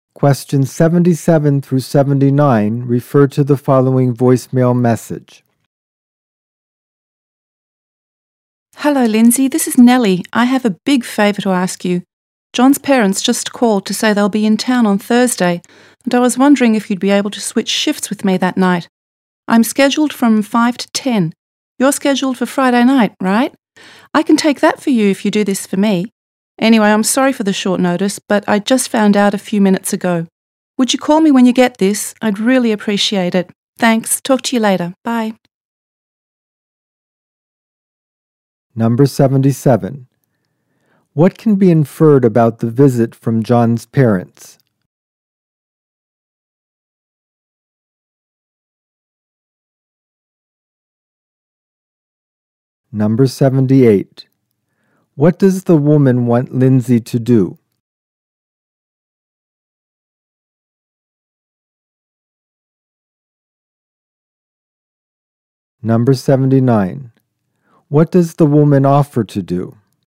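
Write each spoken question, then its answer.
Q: What does the woman want Lindsay to do?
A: Switch shifts with her on Thursday night

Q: What does the woman offer to do?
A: Take Lindsay's Friday night shift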